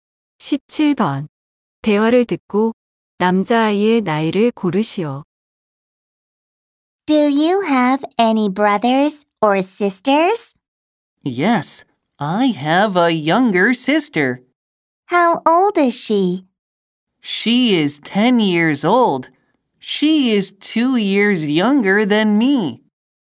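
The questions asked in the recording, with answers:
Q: 대화를 듣고 남자아이의 나이를 고르시오.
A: 12살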